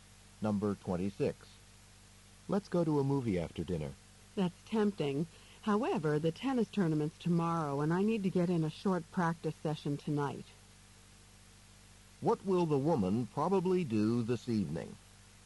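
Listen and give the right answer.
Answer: Practice tennis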